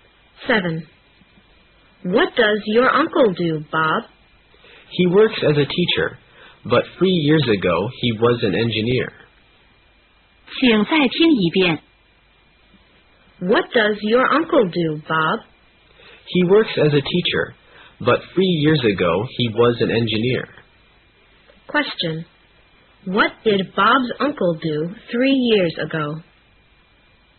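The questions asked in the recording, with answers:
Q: What did Bob's uncle do 3 years ago?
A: He was an engineer.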